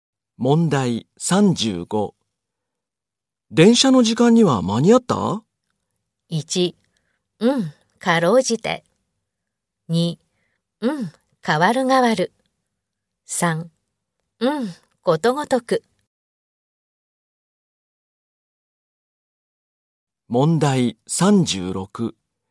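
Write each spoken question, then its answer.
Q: 電車の時間には間に合った?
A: 1: かろうじて。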